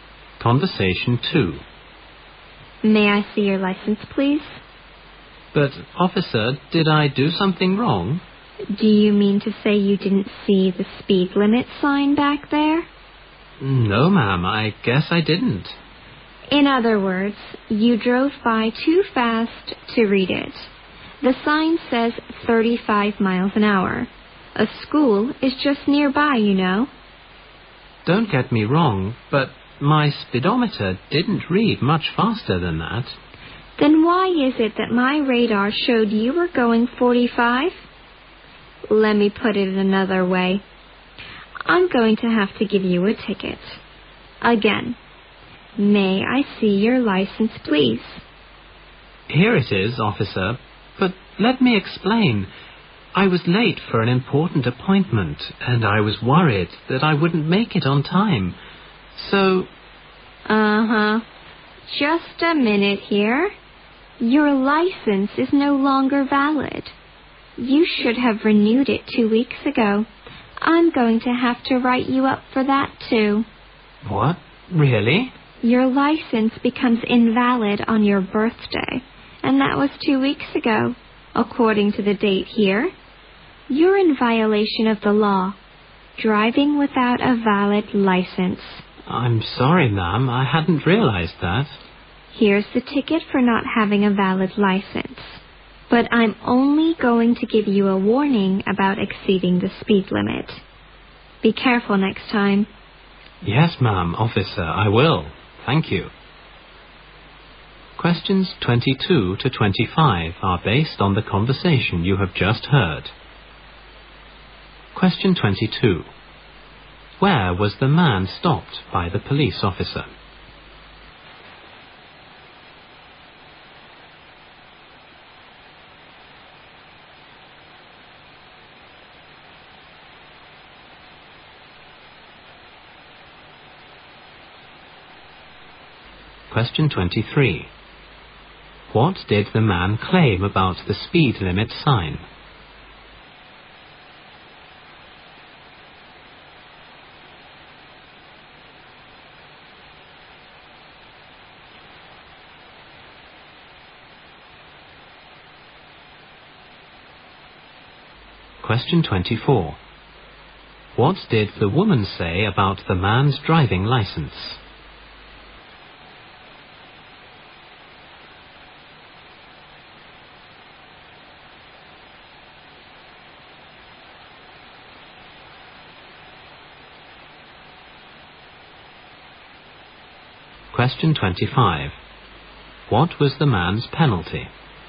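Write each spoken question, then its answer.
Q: Where was the man stopped by the police officer?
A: Near a school

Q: What did the man claim about the speed limit sign?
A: He didn't see it

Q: What did the woman say about the man's driving license?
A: It had expired two weeks ago and was no longer valid

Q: What was the man's penalty?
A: A ticket for driving without a valid license and a warning for speeding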